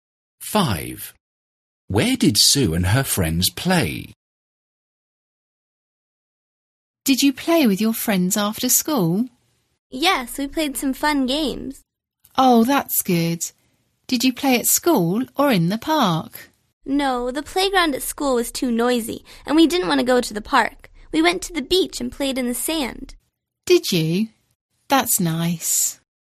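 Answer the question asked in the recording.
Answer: at the beach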